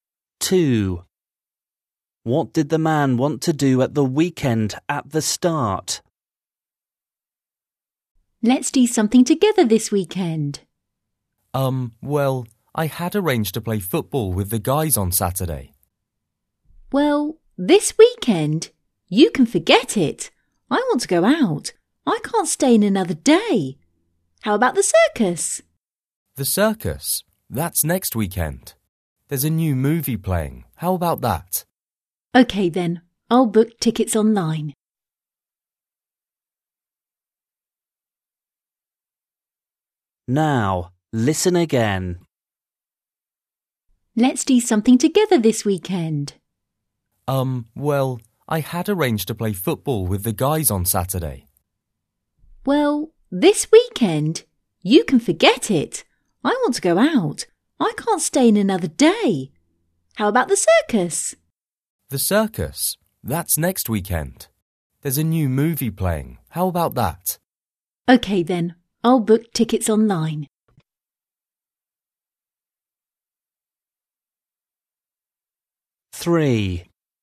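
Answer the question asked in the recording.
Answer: play football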